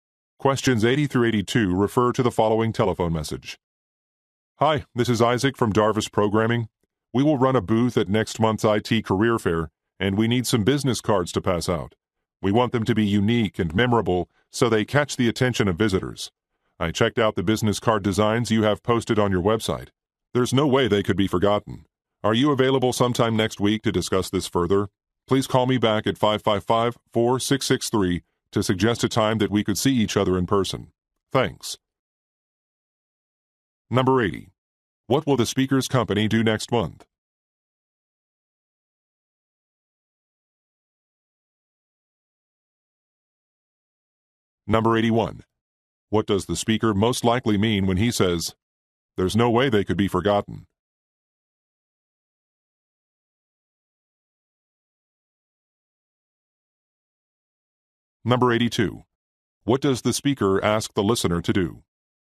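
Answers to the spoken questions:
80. Run a booth at an IT career fair
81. He is impressed by the listener's memorable designs
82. Call him back to suggest a time to meet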